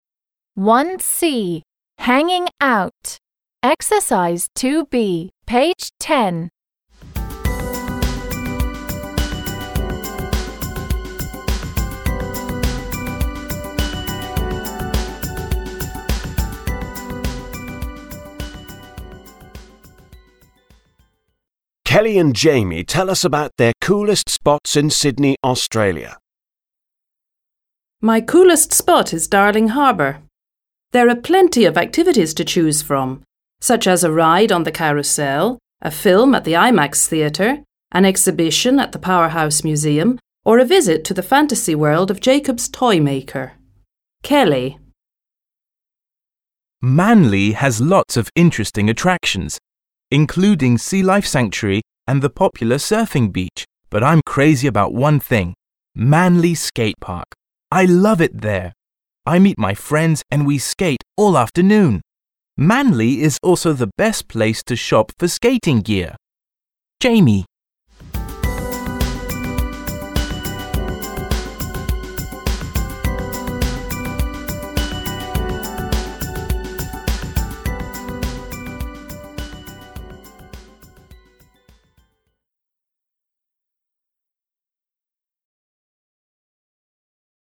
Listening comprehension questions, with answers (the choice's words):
2. b) Complete the gaps. Use: on, for, from, at, about, to. Listen and check. Explain the words in bold.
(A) on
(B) for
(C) from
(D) at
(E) about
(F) to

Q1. There are plenty of activities to choose 1) from such as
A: from

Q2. such as a ride 2) on the carousel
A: on

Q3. a film 3) at the IMAX theatre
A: at

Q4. a visit 4) to the fantasy world of Jacobs Toymaker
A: to

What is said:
Kelly and Jamie tell us about their coolest spots in Sydney, Australia.
My coolest spot is Darling Harbour. There are plenty of activities to choose 1) from such as a ride 2) on the carousel, a film 3) at the IMAX theatre, an exhibition at the Powerhouse museum or a visit 4) to the fantasy world of Jacobs Toymaker. (Kelly)
Manly has lots of interesting attractions, including Sea Life Sanctuary and the popular surfing beach, but I'm crazy 5) about one thing ... I love it there! I meet my friends and we skate all afternoon! Manly is also the best place to shop 6) for skating gear. (Jamie)

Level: 7 класс